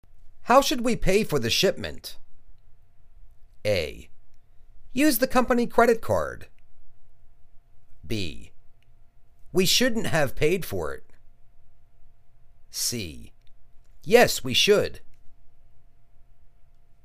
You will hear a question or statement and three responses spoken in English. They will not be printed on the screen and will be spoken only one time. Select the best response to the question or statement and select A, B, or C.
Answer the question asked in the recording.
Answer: Use the company credit card.